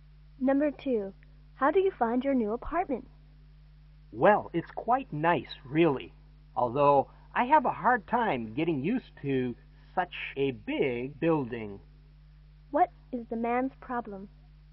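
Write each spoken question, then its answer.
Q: What is the man's problem?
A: He isn't used to living in such a big building.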